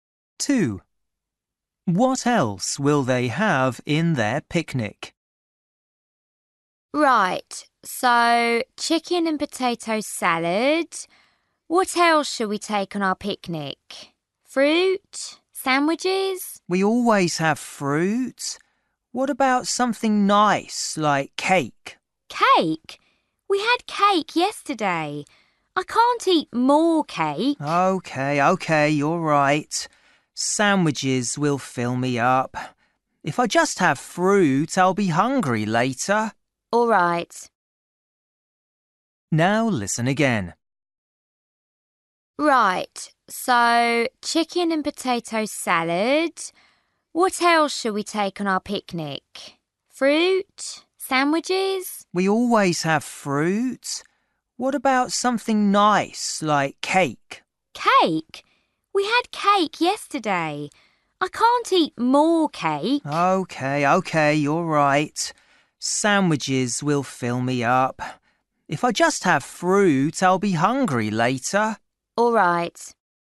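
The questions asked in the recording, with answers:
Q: What else will they have in their picnic?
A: sandwiches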